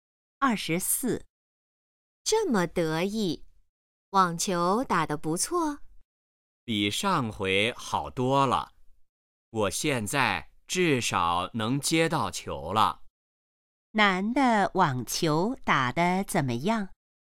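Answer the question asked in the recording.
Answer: 比上回好多了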